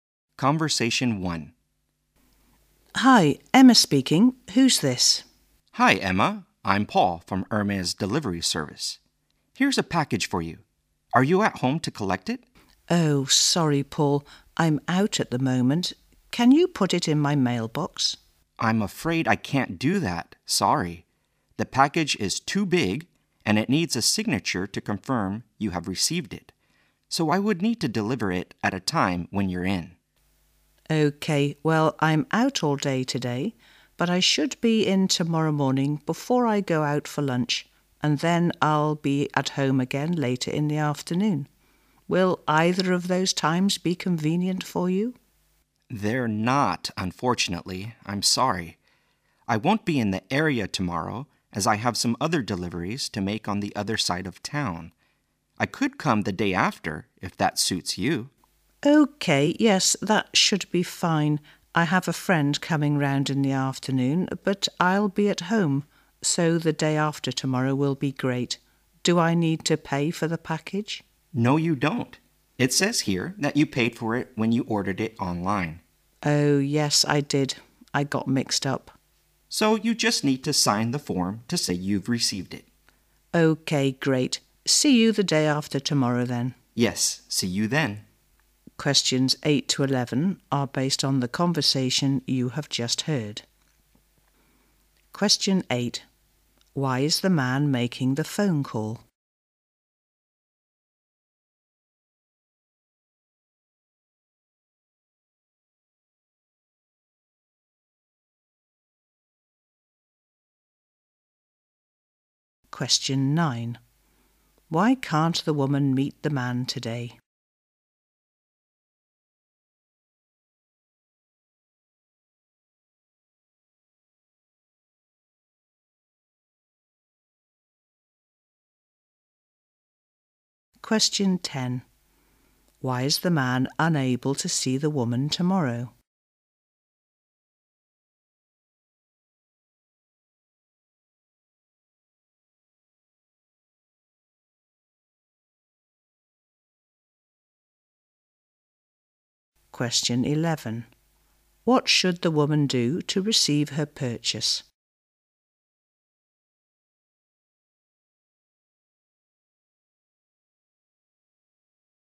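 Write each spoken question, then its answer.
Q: Why is the man making the phone call?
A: To deliver a package to her

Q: Why can't the woman meet the man today?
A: She is out all day

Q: Why is the man unable to see the woman tomorrow?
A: He has other deliveries on the other side of town

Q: What should the woman do to receive her purchase?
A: Sign the form to confirm receipt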